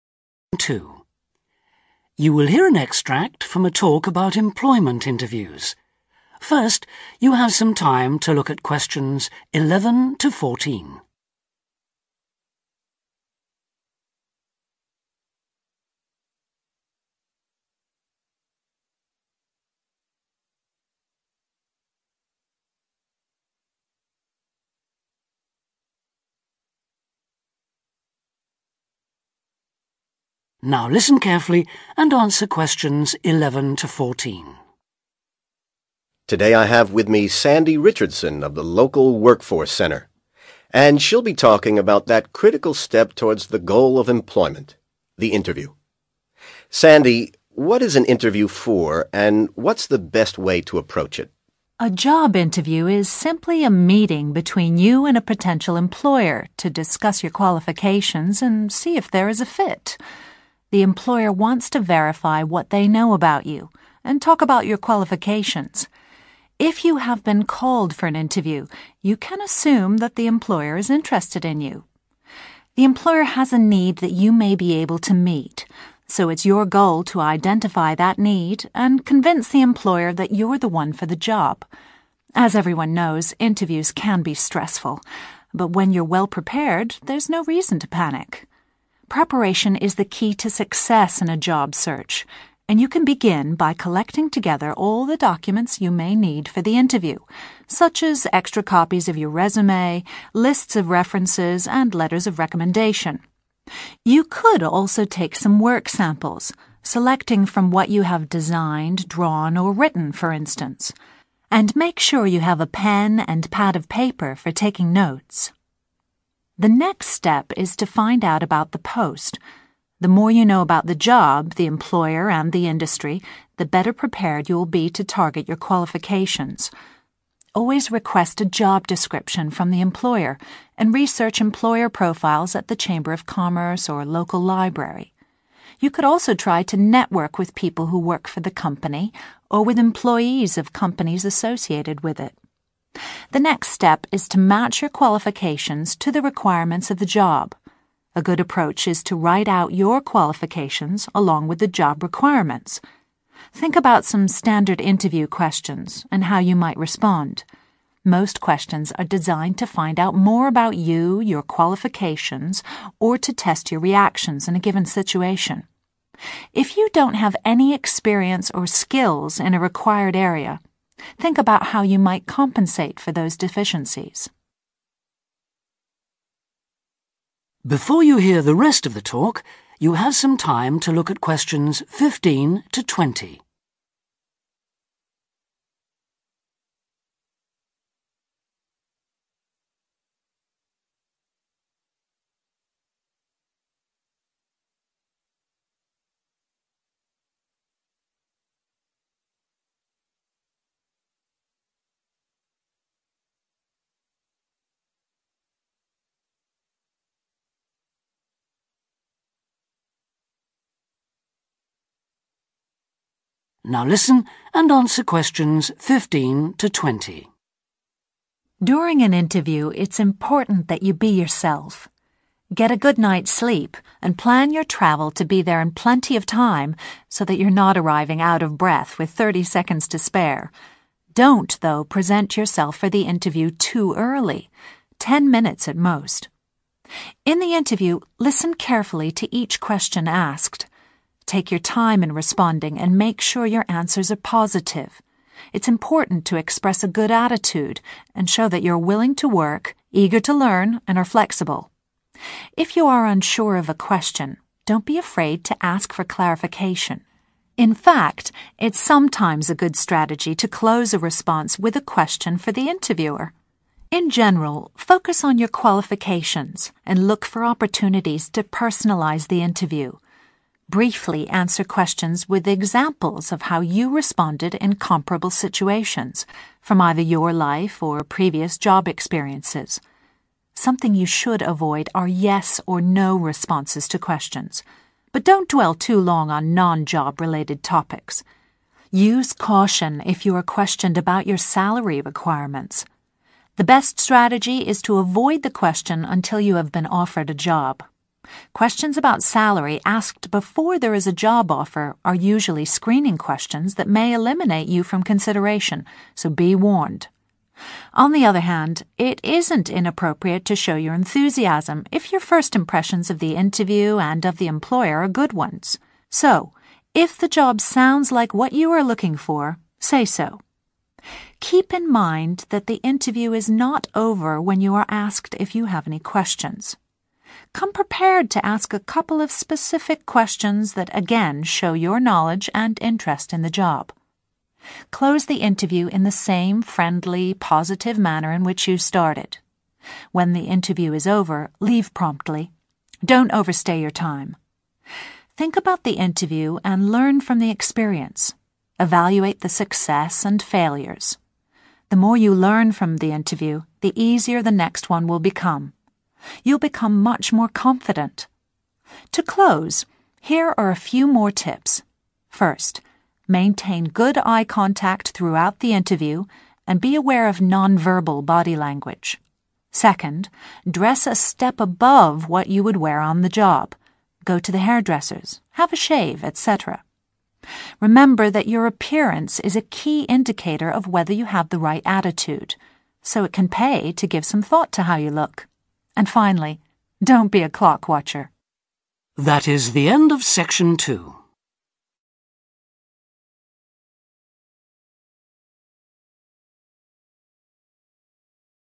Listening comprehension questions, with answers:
Write NO MORE THAN THREE WORDS for each answer.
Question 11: Choose 11 ....................... e.g. designs, drawings, written work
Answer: work samples

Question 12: Ask firm for a 12 .......................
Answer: job description

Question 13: Contact 13 ....................... of this or related firms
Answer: employees

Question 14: Decide how to make up for any 14 ....................... you lack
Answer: experience or skills

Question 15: Arrive no more than 15....................... before the time of the interview.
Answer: ten minutes

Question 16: After you hear the question, you can 16....................... before you reply.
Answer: take your time

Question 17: You can 17....................... if you don't understand what they are asking you.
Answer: ask for clarification

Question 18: Wait for them to offer you the job before you say what 18....................... you want.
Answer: salary

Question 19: Learning from the experience will make you more 19....................... in future interviews.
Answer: confident

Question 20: Pay attention to your 20....................... – it shows you have a positive attitude.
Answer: appearance